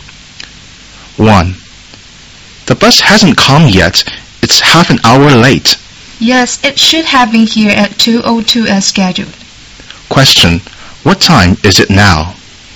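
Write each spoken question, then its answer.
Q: What time is it now?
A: 2:32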